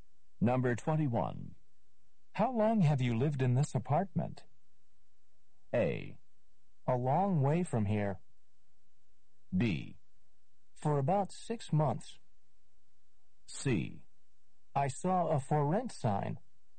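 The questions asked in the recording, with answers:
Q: How long have you lived in this apartment?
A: B: For about 6 months.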